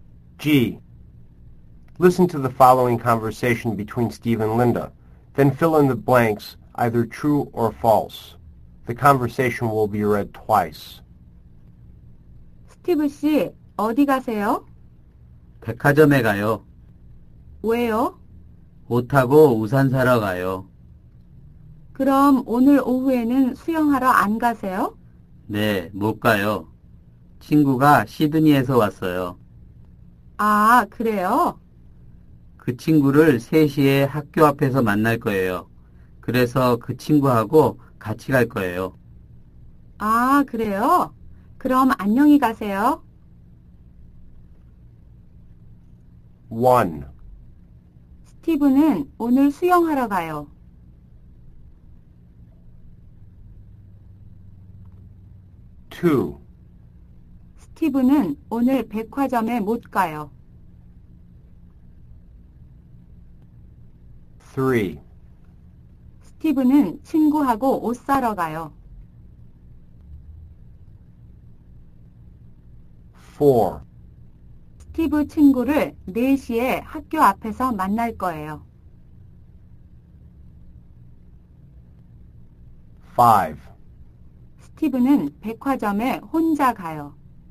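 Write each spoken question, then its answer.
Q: 스티브는 오늘 수영하러 가요.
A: False

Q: 스티브는 오늘 백화점에 못 가요.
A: False

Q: 스티브 친구를 4시에 학교 앞에서 만날 거예요.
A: False

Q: 스티브는 백화점에 혼자 가요.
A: False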